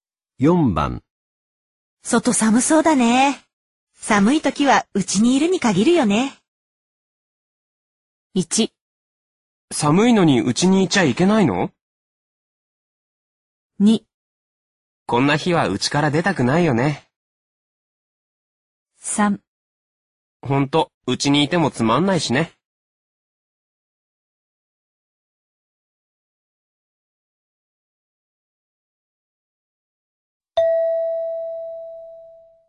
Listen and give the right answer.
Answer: 2

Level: N2